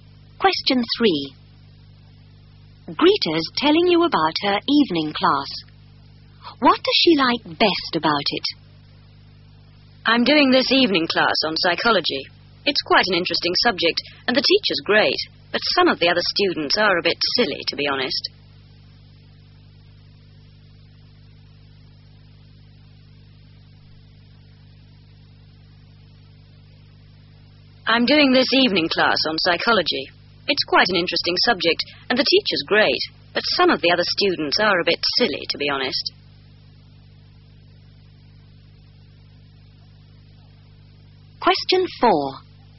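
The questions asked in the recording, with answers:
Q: What does she like best about it?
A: The teacher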